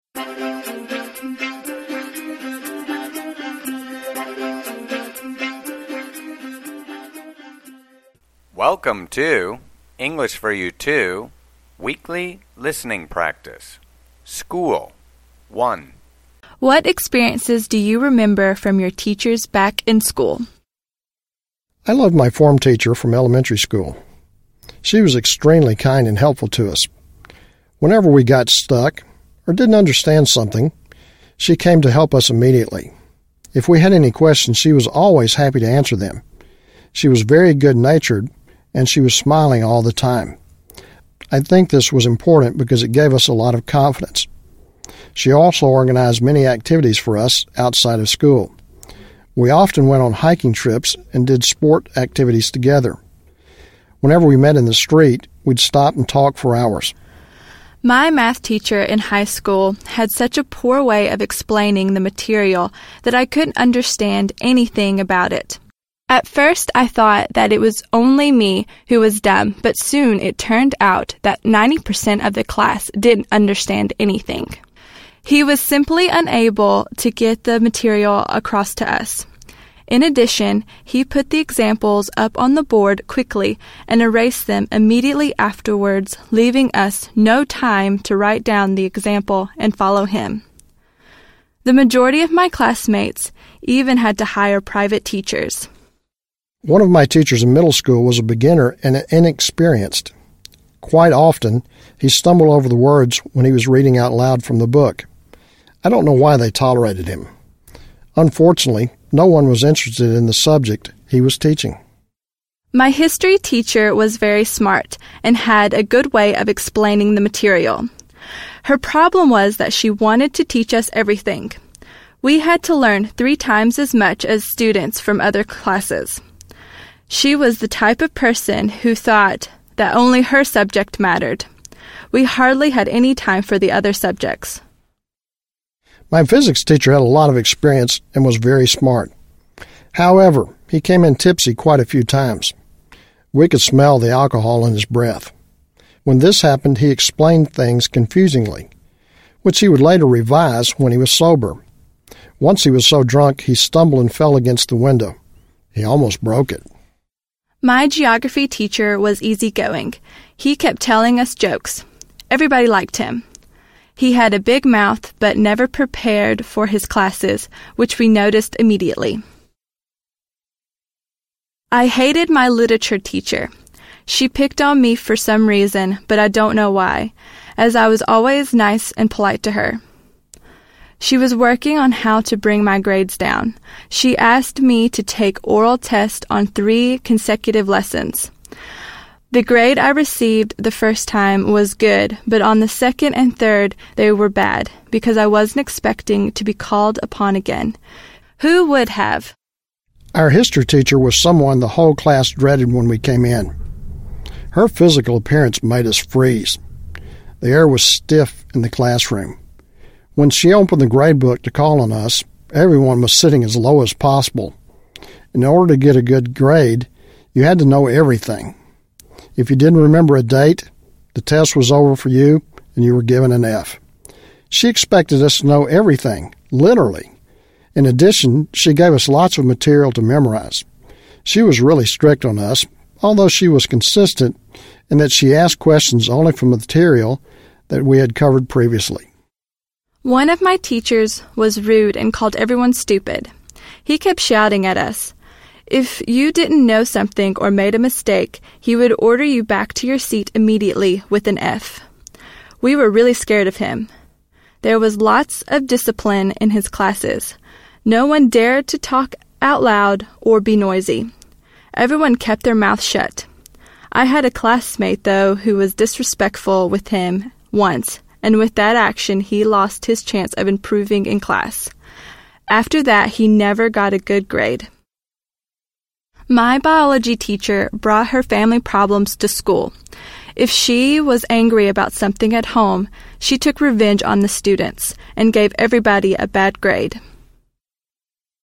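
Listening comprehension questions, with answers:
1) What was the teacher always – happy – to do?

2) What would the student and the teacher do – on the street?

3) What was the math teacher unable to – get across?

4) What is the history teacher's – problem?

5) What does the word – tipsy – mean?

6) What does it mean to be – called upon?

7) What about the history teacher made the students – freeze?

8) What did the history teacher give – a lot of – to her students?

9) What happened to the student who was – disrespectful?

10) What did the biology teacher – bring to class?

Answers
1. answer the students' questions
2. stop and talk for hours
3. the material
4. she wanted to teach them everything
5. slightly drunk
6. to be asked by the teacher to answer or take a test
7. her physical appearance
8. material to memorize
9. he never got a good grade again
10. her family problems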